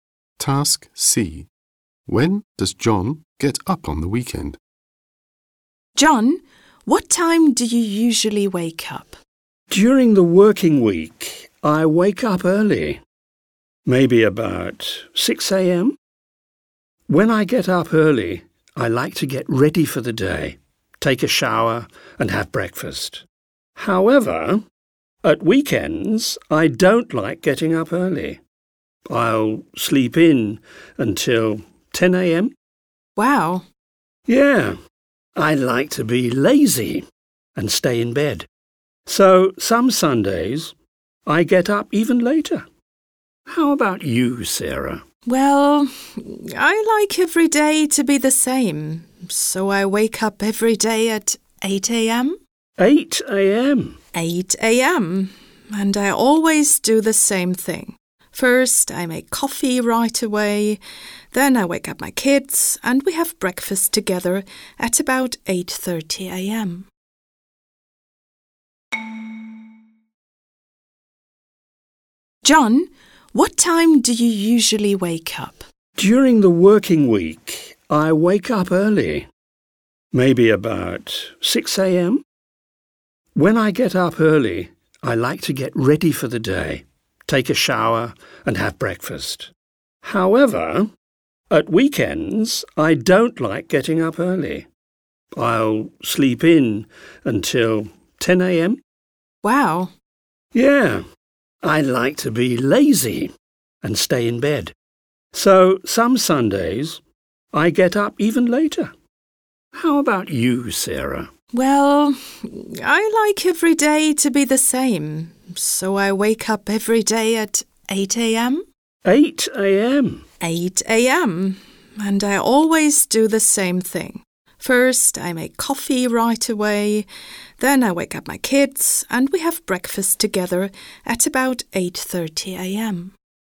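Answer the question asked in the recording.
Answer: At 10 a.m. (some Sundays even later)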